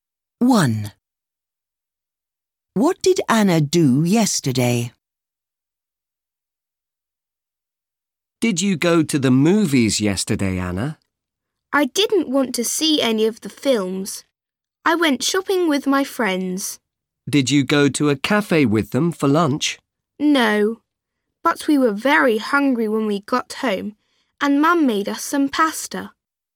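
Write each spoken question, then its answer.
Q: What did Anna do yesterday?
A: She went shopping with her friends.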